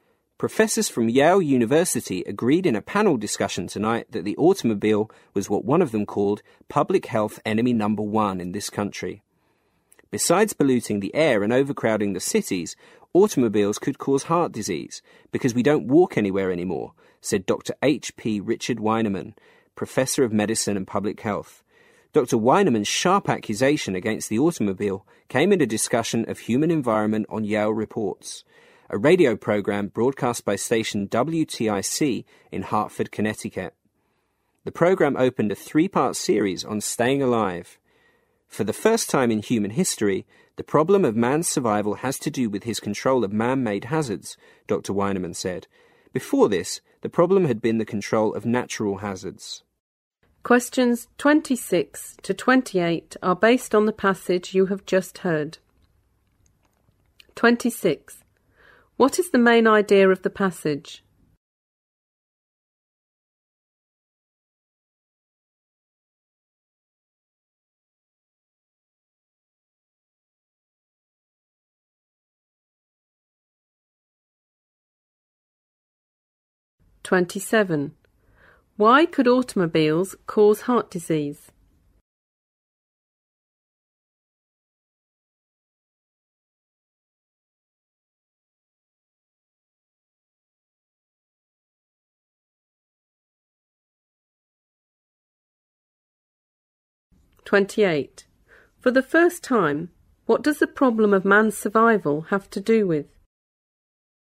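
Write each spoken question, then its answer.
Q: What is the main idea of the passage?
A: The automobile is public health enemy number one

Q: Why could automobiles cause heart disease?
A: Because people don't walk anywhere anymore

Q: For the first time, what does the problem of man's survival have to do with?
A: His control of man-made hazards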